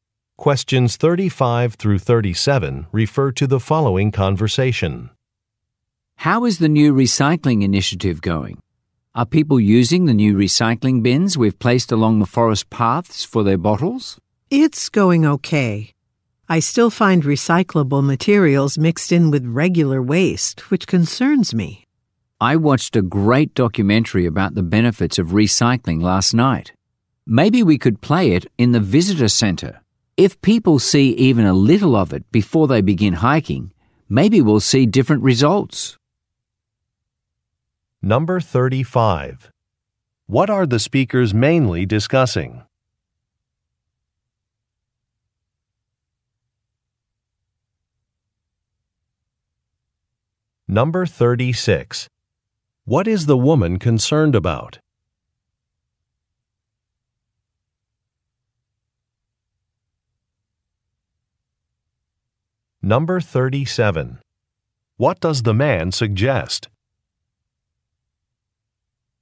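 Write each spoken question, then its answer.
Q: What are the speakers mainly discussing?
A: A new recycling initiative

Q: What is the woman concerned about?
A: Recyclables mixed in with regular waste

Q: What does the man suggest?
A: Showing a recycling documentary in the visitor center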